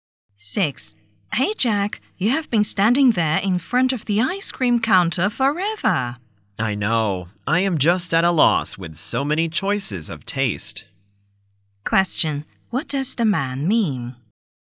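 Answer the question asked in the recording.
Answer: He can't decide which flavor to choose.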